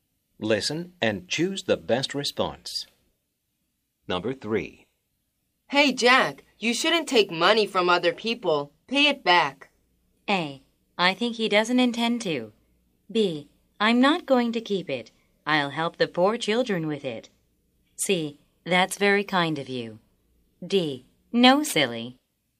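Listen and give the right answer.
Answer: B: I'm not going to keep it. I'll help the poor children with it.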